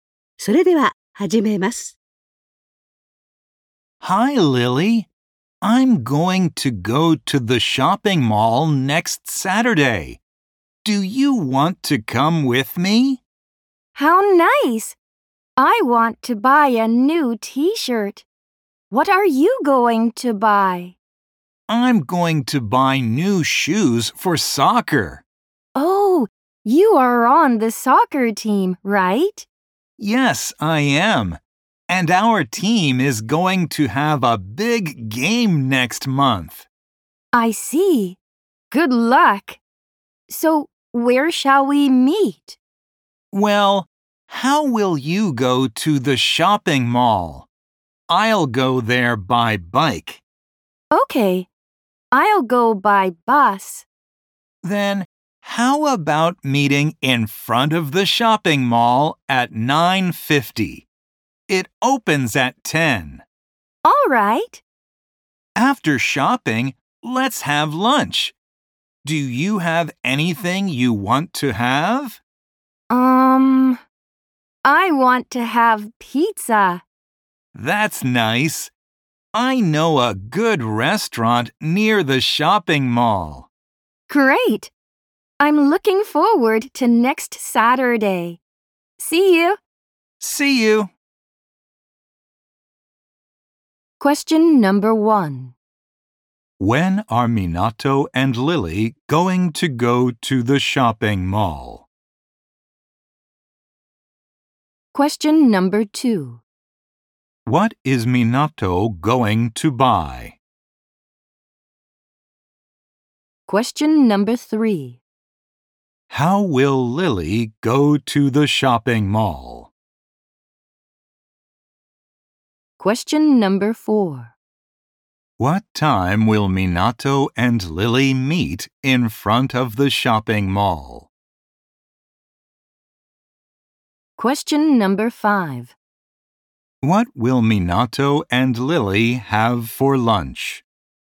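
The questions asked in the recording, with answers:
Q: When are Minato and Lily going to go to the shopping mall?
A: Next Saturday

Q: What is Minato going to buy?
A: New shoes for soccer

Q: What time will Minato and Lily meet in front of the shopping mall?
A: At 9:50

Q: What will Minato and Lily have for lunch?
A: Pizza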